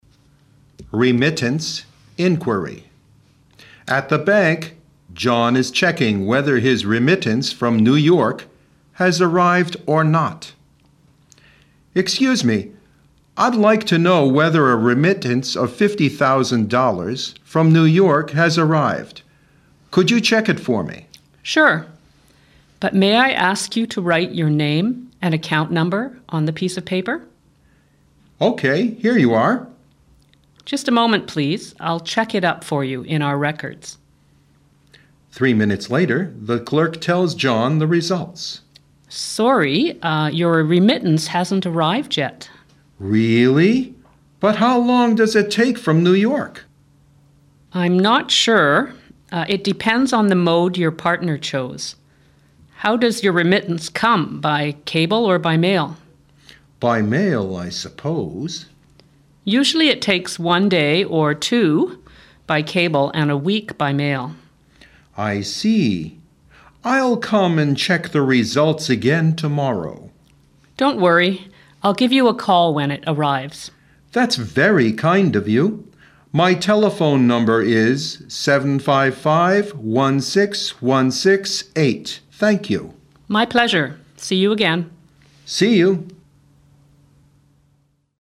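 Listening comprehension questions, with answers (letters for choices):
二、听力理解:请听下面的对话,根据对话内容填入相应的句子或短语。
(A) remittance by cable and remittance by mail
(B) to transfer funds by mail than by cable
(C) a customer's name and account number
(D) transferring funds among different places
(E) take different working days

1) Checking a remittance needs 2 .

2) Two modes of remittance are mentioned in the dialog 3 .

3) Different modes of remittance 4 .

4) Usually it costs more time 5 .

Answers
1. C
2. A
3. E
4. B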